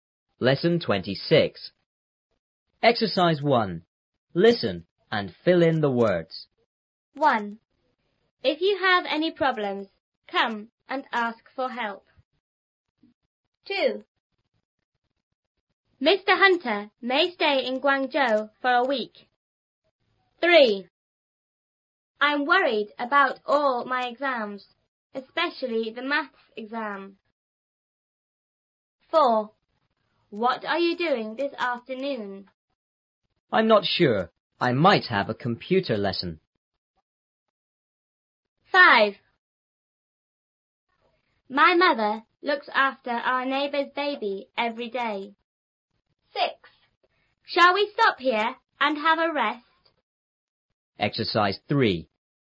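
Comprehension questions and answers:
1.Listen and fill in the words.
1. If you have any___,come and ask for help.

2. Mr Hunter___ ___in Guangzhou for a week.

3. I'm___about all my exams,___the maths exam.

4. B:I'm not sure.I___ ___a computer lesson.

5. My mother___ ___our neighbour's baby every day.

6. Shall we stop here and___ ___ ___?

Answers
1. problems
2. may stay
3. worried; especially
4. might have
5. looks after
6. have a rest

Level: 初中英语广州版3B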